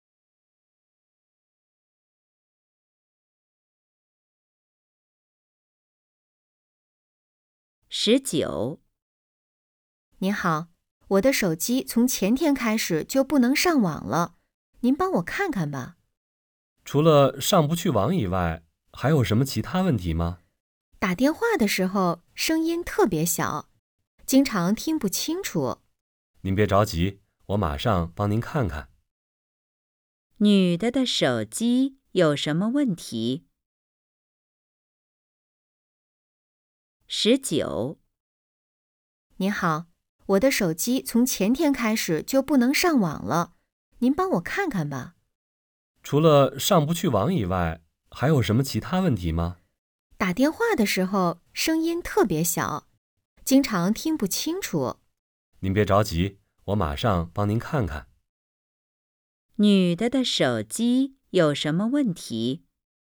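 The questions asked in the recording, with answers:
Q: 女的的手机有什么问题?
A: 不能上网,打电话声音特别小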